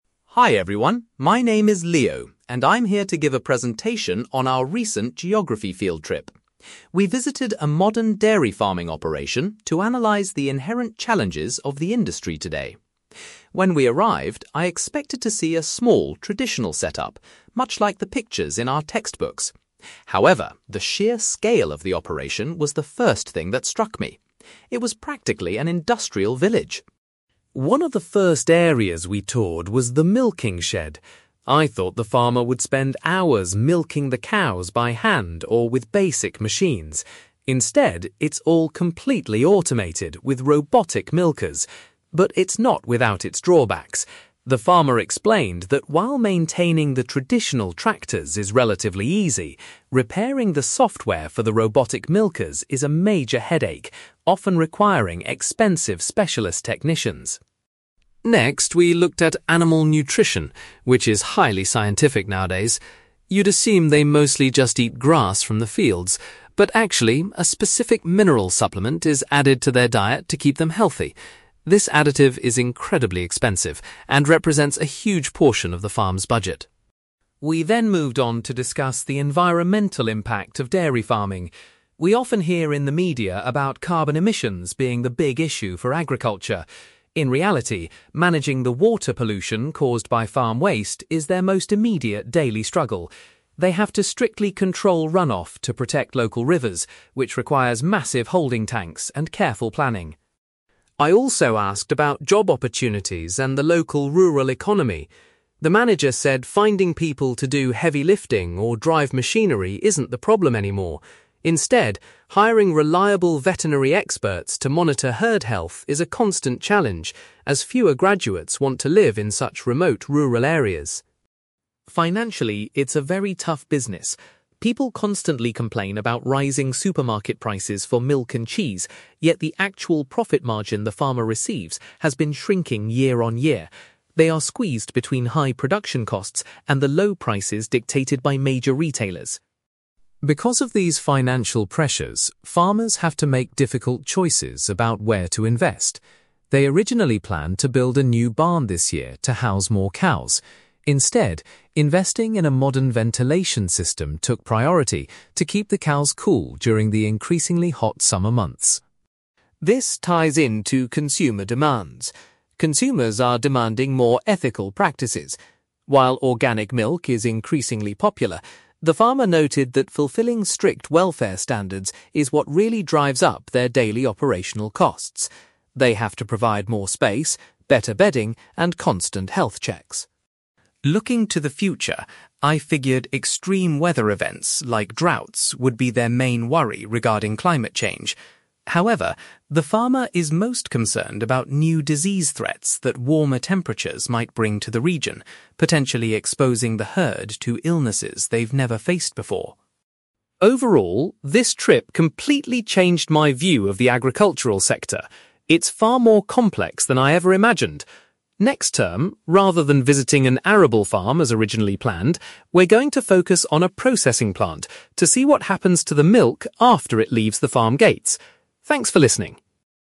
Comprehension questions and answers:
You will hear a student called Leo delivering a presentation about a recent field trip to a dairy farm. For questions 9-18, complete the sentences with a word or short phrase.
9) Leo was initially surprised by the (9)........................... of the dairy farm he visited.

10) The farmer struggles most with fixing the (10)........................... used in the automated milking machines.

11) To ensure the cows remain healthy, a costly (11)........................... is mixed into their daily feed.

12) According to the farmer, dealing with (12)........................... is their most pressing environmental concern.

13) The farm manager highlighted the difficulty of recruiting dependable (13)........................... for the animals.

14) Leo learned that the farmer's (14)........................... continues to decrease despite high supermarket prices.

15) The farm recently chose to spend money on a new (15)........................... instead of constructing an additional building.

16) Meeting rigorous (16)........................... is the primary reason for the farm's high running costs.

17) The farmer is particularly worried that climate change will introduce unpredictable (17)........................... to the herd.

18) For their next field trip, Leo's class will investigate a (18)........................... .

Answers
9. scale
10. software
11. mineral supplement
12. water pollution
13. veterinary experts
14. profit margin
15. ventilation system
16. welfare standards
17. disease threats
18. processing plant

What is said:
Leo: Hi everyone, my name is Leo, and I'm here to give a presentation on our recent geography field trip. We visited a modern dairy farming operation to analyze the inherent challenges of the industry today. When we arrived, I expected to see a small, traditional setup, much like the pictures in our textbooks. However, the sheer scale of the operation was the first thing that struck me. It was practically an industrial village!
One of the first areas we toured was the milking shed. I thought the farmer would spend hours milking the cows by hand or with basic machines. Instead, it's all completely automated with robotic milkers. But it's not without its drawbacks. The farmer explained that while maintaining the traditional tractors is relatively easy, repairing the software for the robotic milkers is a major headache, often requiring expensive specialist technicians.
Next, we looked at animal nutrition, which is highly scientific nowadays. You'd assume they mostly just eat grass from the fields, but actually, a specific mineral supplement is added to their diet to keep them healthy. This additive is incredibly expensive and represents a huge portion of the farm's budget.
We then moved on to discuss the environmental impact of dairy farming. We often hear in the media about carbon emissions being the big issue for agriculture. In reality, managing the water pollution caused by farm waste is their most immediate daily struggle. They have to strictly control runoff to protect local rivers, which requires massive holding tanks and careful planning.
I also asked about job opportunities and the local rural economy. The manager said finding people to do heavy lifting or drive machinery isn't the problem anymore. Instead, hiring reliable veterinary experts to monitor herd health is a constant challenge, as fewer graduates want to live in such remote rural areas.
Financially, it's a very tough business. People constantly complain about rising supermarket prices for milk and cheese, yet the actual profit margin the farmer receives has been shrinking year on year. They are squeezed between high production costs and the low prices dictated by major retailers.
Because of these financial pressures, farmers have to make difficult choices about where to invest. They originally planned to build a new barn this year to house more cows. Instead, investing in a modern ventilation system took priority to keep the cows cool during the increasingly hot summer months.
This ties into consumer demands. Consumers are demanding more ethical practices. While organic milk is increasingly popular, the farmer noted that fulfilling strict welfare standards is what really drives up their daily operational costs. They have to provide more space, better bedding, and constant health checks.
Looking to the future, I figured extreme weather events like droughts would be their main worry regarding climate change. However, the farmer is most concerned about new disease threats that warmer temperatures might bring to the region, potentially exposing the herd to illnesses they've never faced before.
Overall, this trip completely changed my view of the agricultural sector. It's far more complex than I ever imagined. Next term, rather than visiting an arable farm as originally planned, we're going to focus on a processing plant to see what happens to the milk after it leaves the farm gates. Thanks for listening!

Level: B2